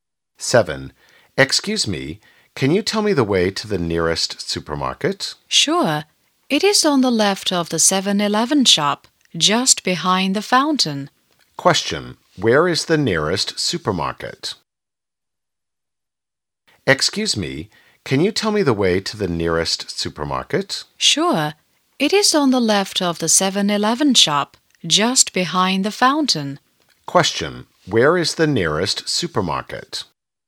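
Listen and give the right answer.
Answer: On the left of the 7-Eleven shop, behind the fountain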